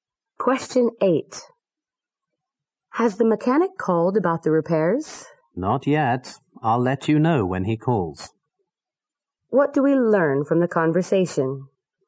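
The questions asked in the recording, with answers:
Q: What do we learn from the conversation?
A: The mechanic hasn't called yet.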